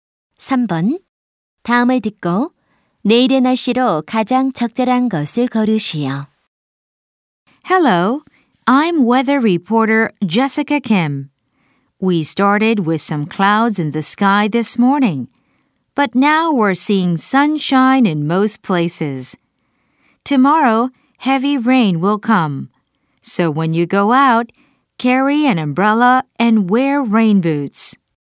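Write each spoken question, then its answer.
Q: 다음을 듣고 내일의 날씨로 가장 적절한 것을 고르시오.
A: 비가 많이 옴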